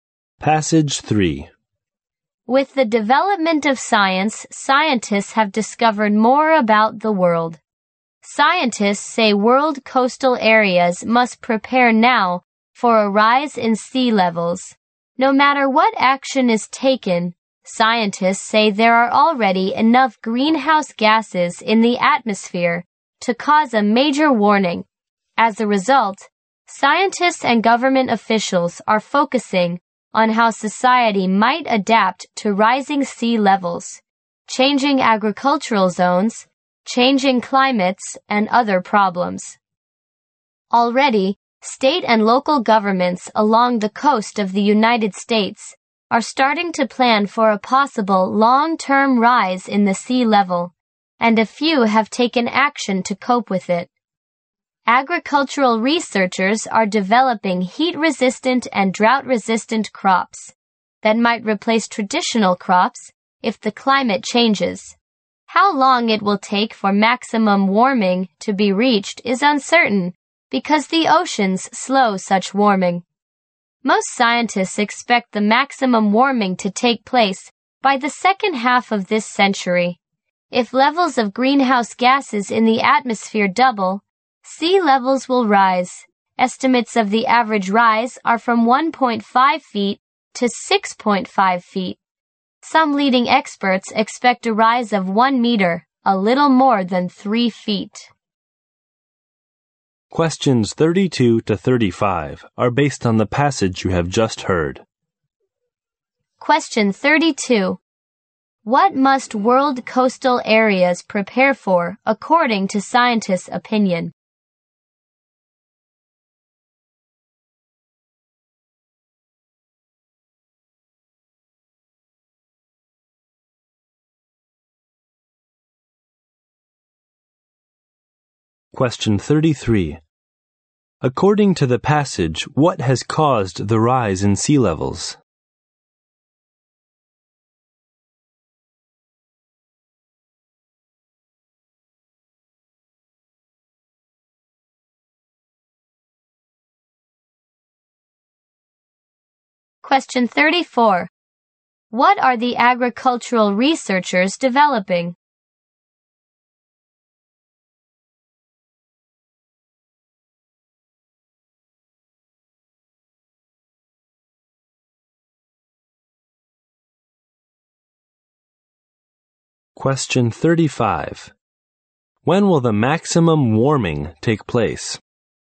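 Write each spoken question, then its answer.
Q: What must world coastal areas prepare for, according to scientists' opinion?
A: A rise in sea levels

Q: According to the passage, what has caused the rise in sea levels?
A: Greenhouse gases causing global warming

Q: What are the agricultural researchers developing?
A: Heat-resistant and drought-resistant crops

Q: When will the maximum warming take place?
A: By the second half of this century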